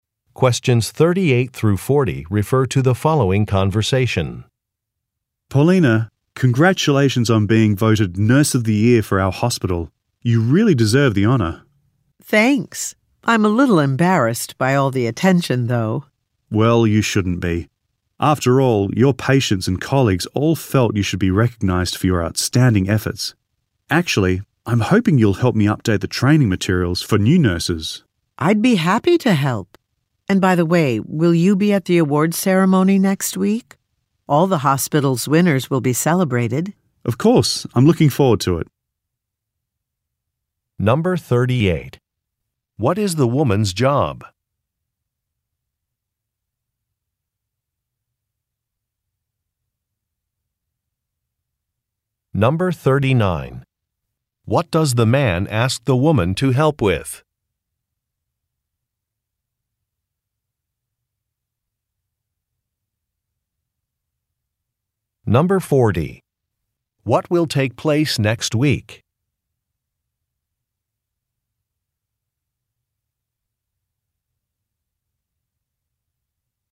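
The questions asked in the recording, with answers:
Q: What is the woman's job?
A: Nurse

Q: What does the man ask the woman to help with?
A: Updating training materials for new nurses

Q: What will take place next week?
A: An awards ceremony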